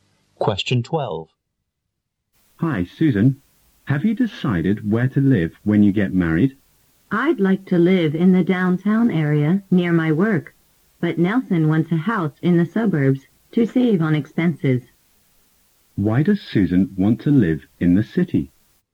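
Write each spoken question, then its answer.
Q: Why does Susan want to live in the city?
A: To be near her work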